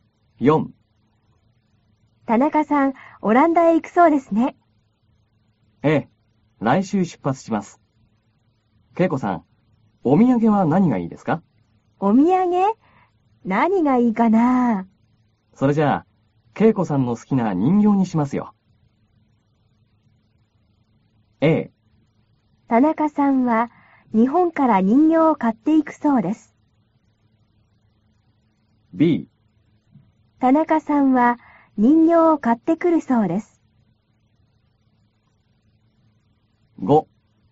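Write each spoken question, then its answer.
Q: A。田中さんは日本から人形を買っていくそうです。B。田中さんは人形を買ってくるそうです。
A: B: 田中さんは人形を買ってくるそうです。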